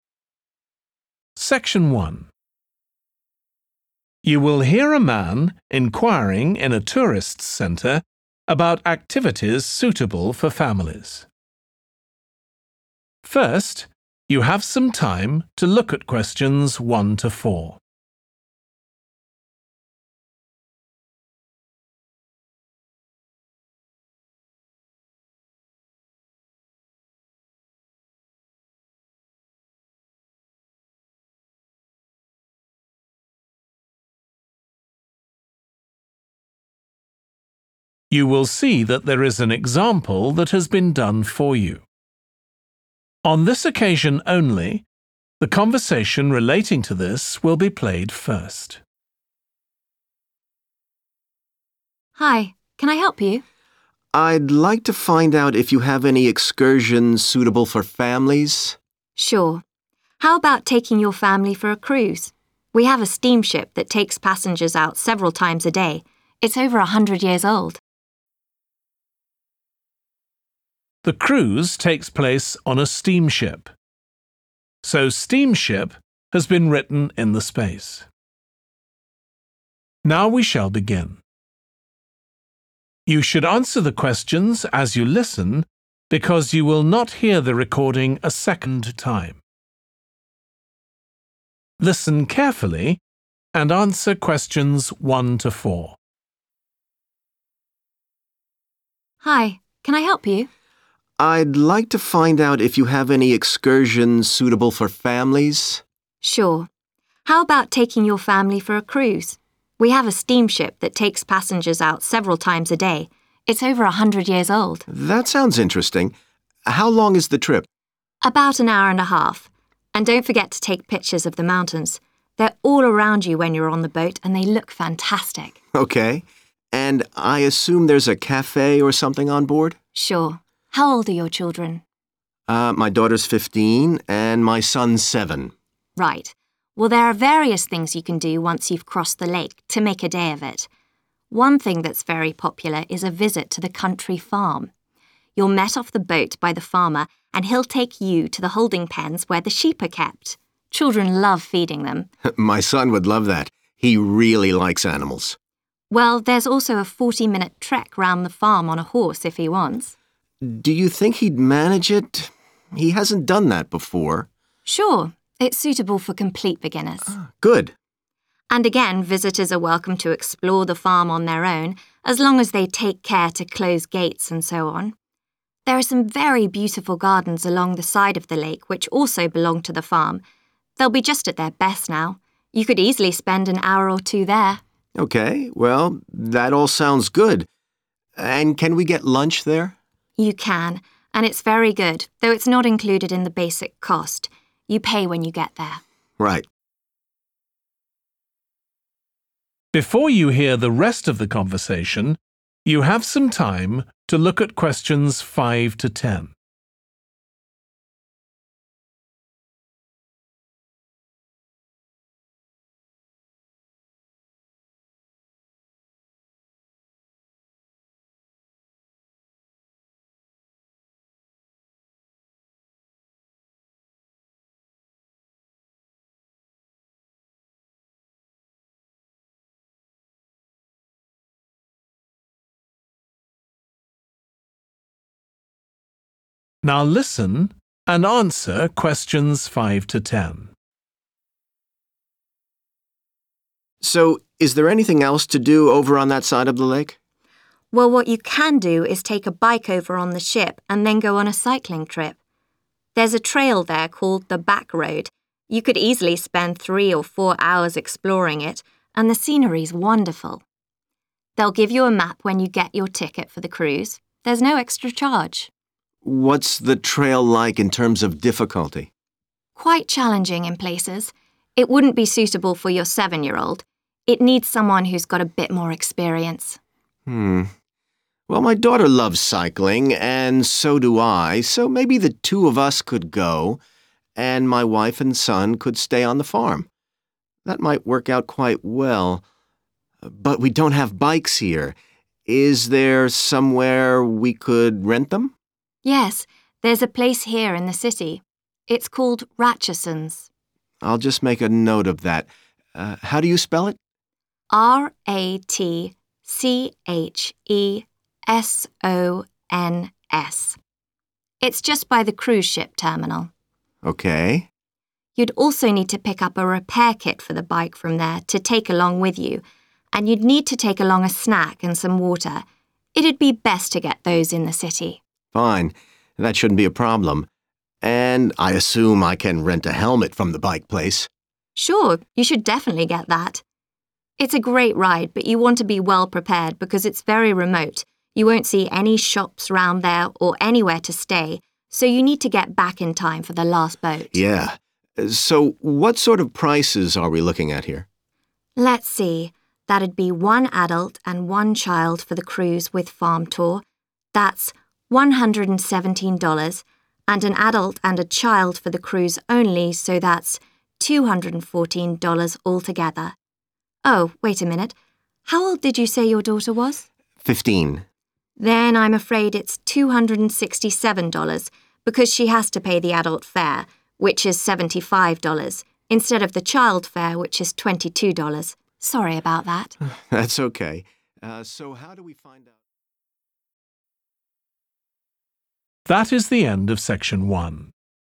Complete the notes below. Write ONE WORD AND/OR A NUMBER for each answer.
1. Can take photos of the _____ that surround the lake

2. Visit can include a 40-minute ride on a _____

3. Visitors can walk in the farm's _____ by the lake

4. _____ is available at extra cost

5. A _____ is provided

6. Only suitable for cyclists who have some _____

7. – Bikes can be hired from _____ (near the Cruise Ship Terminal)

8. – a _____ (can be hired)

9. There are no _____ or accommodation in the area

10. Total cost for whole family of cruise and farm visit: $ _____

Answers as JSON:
{"1": "mountains", "2": "horse", "3": "garden / gardens", "4": "lunch", "5": "map", "6": "experience", "7": "Ratchesons", "8": "helmet", "9": "shops", "10": "267"}

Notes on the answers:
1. And don't forget to take pictures of the mountains. Excerpt/Transcript Explanation: The transcript mentions not to forget to take pictures of the mountains, which means capturing images of the tall, rocky landforms. Answer Explanation: The answer 'mountains' refers to large landforms that are typically covered by rocks and may have snow on top. Reason For Correctness: The correct answer is 'mountains' because it fits the context of capturing images of tall landforms, as mentioned in the excerpt.
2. Well, there's also a 40-minute trek round the farm on a house, if he wants. Excerpt/Transcript Explanation: The transcript mentions a 40-minute trek around the farm on a horse if someone wants to participate. Answer Explanation: The answer 'horse' refers to an animal that can be ridden for the mentioned trek around the farm. Reason For Correctness: The correct answer is 'horse' because it fits the context of riding an animal for a short tour around the farm, as described in the excerpt.
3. There are some very beautiful gardens along the side of the lake which also belong to the farm Excerpt/Transcript Explanation: The transcript mentions that there are beautiful areas with plants and flowers next to the lake that are also part of the farm. Answer Explanation: The answer 'garden' or 'gardens' refers to the outdoor areas with plants and flowers that are likely well-maintained and scenic. Reason For Correctness: The correct answer matches the description in the excerpt where it talks about beautiful gardens along the side of the lake, indicating that the farm includes visually appealing outdoor spaces with plants and flowers.
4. And can we get lunch there? Excerpt/Transcript Explanation: The transcript suggests that the person is asking if they can have a meal at the farm during their visit. Answer Explanation: The answer indicates that lunch is available, which means that the person can indeed have a meal at the farm. Reason For Correctness: The correct answer aligns with the question asked in the excerpt, which directly inquires about the availability of lunch at the farm. It provides a clear and direct response to the query.
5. They'll give you a map when you get your ticket for the cruise – there's no extra charge. Excerpt/Transcript Explanation: The transcript is saying that when you go on the cruise, they will give you a map without asking for any extra money. Answer Explanation: The answer suggests that the map is needed for something on the cruise. Reason For Correctness: The correct answer is 'map' because the excerpt mentions that a map will be provided when you get the ticket for the cruise, indicating its importance for navigating during the excursion.
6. It needs someone who's got a bit more experience. Excerpt/Transcript Explanation: The transcript mentions that the activity requires someone with more knowledge or practice in that particular field. Answer Explanation: The answer 'experience' refers to the knowledge and skills gained from doing something multiple times or being exposed to it regularly. Reason For Correctness: The correct answer is 'experience' because the excerpt indicates that the task needs someone with a certain level of understanding or practice, which aligns with the meaning of 'experience'. In this context, it suggests that the activity requires someone with previous knowledge or skill in that area, in this case, for a specific task or job.
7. It's called Ratchesons. Excerpt/Transcript Explanation: The transcript mentioned a specific name, 'Ratchesons.' Answer Explanation: The answer 'Ratchesons' refers to a specific place or service provider. Reason For Correctness: The correct answer is 'Ratchesons' because it matches the specific name mentioned in the excerpt, indicating that it could be a rental service or a point of interest related to the activities described in the notes.
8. And I assume I can rent a helmet from the bike place? Excerpt/Transcript Explanation: The transcript is asking if it's possible to borrow or get a helmet from the bike rental place. Answer Explanation: The answer is referring to a 'helmet,' which is a protective headgear worn while cycling. Reason For Correctness: The correct answer matches the item needed for cyclists to wear for safety as implied in the excerpt where the person is inquiring about renting a helmet while renting a bike.
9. The transcript is mentioning that the cycling area is very remote, and there are no shops or places to stay nearby. Answer Explanation: The answer 'shops' refers to places where you can buy things. In this context, it means there are no stores or shops around for buying supplies or necessities. Reason For Correctness: The correct answer is 'shops' because it fits the context provided in the excerpt, which mentions the lack of shops or stores in the remote cycling area. This shows that visitors need to ensure they have all necessary supplies with them beforehand.
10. Then I'm afraid it's $267 Excerpt/Transcript Explanation: The transcript indicates that the total cost for the whole family for the cruise and farm visit is $267. Answer Explanation: The answer given is the total cost for the family's excursion, which is $267. Reason For Correctness: The correct answer matches the cost provided in the excerpt, confirming that it is the total amount needed for the family excursion.

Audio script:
TC EMPLOYEE: Hi. Can I help you?
VISITOR: I'd like to find out if you have any excursions suitable for families.
TC EMPLOYEE: Sure. How about taking your family for a cruise? We have a steamship that takes passengers out several times a day – it's over 100 years old.
VISITOR: That sounds interesting. How long is the trip?
TC EMPLOYEE: About an hour and a half. And don't forget to take pictures of the mountains. They're all around you when you're on the boat and they look fantastic.
VISITOR: OK. And I assume there's a café or something on board?
TC EMPLOYEE: Sure. How old are your children?
VISITOR: Er, my daughter's fifteen and my son's seven.
TC EMPLOYEE: Right. Well there are various things you can do once you've crossed the lake, to make a day of it. One thing that's very popular is a visit to the Country Farm. You're met off the boat by the farmer and he'll take you to the holding pens, where the sheep are kept. Children love feeling them!
VISITOR: My son would love that. He really likes animals.
TC EMPLOYEE: Well, there's also a 40-minute trek round the farm on a house, if he wants.
VISITOR: Do you think he'd manage it? He hasn't done that before.
TC EMPLOYEE: Sure. It's suitable for complete beginners.
TC EMPLOYEE: And again, visitors are welcome to explore the farm on their own, as long as they take care to close gates and so on. There are some very beautiful gardens along the side of the lake which also belong to the farm – they'll be just at their best now. You could easily spend an hour or two there.
VISITOR: OK. Well that all sounds good. And can we get lunch there?
TC EMPLOYEE: You can, and it's very good, though it's not included in the basic cost. You pay when you get there.
VISITOR: Right.
VISITOR: So is there anything else to do over on that side of the lake?
TC EMPLOYEE: Well, what you can do is take a bike over on the ship and then go on a cycling trip. There's a trail there called the Back Road – you could easily spend three or four hours exploring it, and the scenery's wonderful. They'll give you a map when you get your ticket for the cruise – there's no extra charge.
VISITOR: What's the trail like in terms of difficulty?
TC EMPLOYEE: Quite challenging in places. It wouldn't be suitable for your seven-year-old. It needs someone who's got a bit more experience.
VISITOR: Hmm. Well, my daughter loves cycling and so do I, so maybe the two of us could go, and my wife and son could stay on the farm. That might work out quite well. But we don't have bikes here... is there somewhere we could rent them?
TC EMPLOYEE: Yes, there's a place here in the city. It's called Ratchesons.
VISITOR: I'll just make a note of that – er, how do you spell it?
TC EMPLOYEE: R-A-T-C-H-E-S-O-N-S. It's just be the cruise ship terminal.
VISITOR: OK.
TC EMPLOYEE: You'd also need to pick up a repair kit for the bike from there to take along with you, and you'd need to take along a snack and some water – it'd be best to get those in the city.
VISITOR: Fine. That shouldn't be a problem. And I assume I can rent a helmet from the bike place?
TC EMPLOYEE: Sure, you should definitely get that. It's a great ride, but you want to be well prepared because it's very remote – you won't see any shops round there, or anywhere to stay, so you need to get back in time for the last boat.
VISITOR: Yeah. So what sort of prices are we looking at here?
TC EMPLOYEE: Let's see, that'd be one adult and one child for the cruise with farm tour, that's $117, and an adult and a child for the cruise only so that's $214 dollars altogether. Oh, wait a minute, how old did you say your daughter was?
TC EMPLOYEE: Then I'm afraid it's $267 because she has to pay the adult fare, which is $75 instead of the child fare which is $22 – sorry about that.